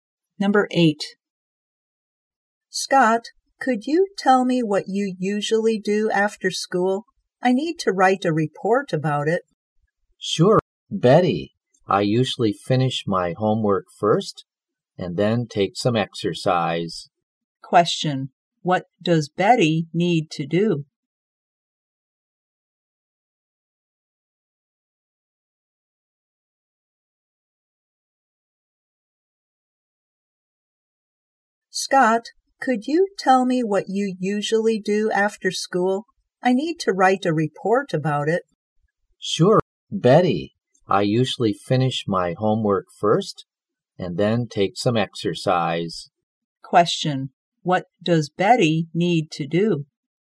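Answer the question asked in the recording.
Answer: Write a report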